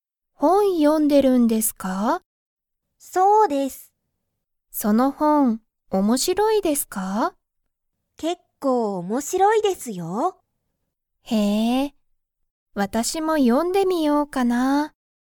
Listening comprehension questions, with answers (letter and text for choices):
その本(ほん)は____。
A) 面白(おもしろ)い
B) 楽(たの)しい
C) 一緒(いっしょ)だ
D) 最近(さいきん)だ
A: A) 面白(おもしろ)い

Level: Level 1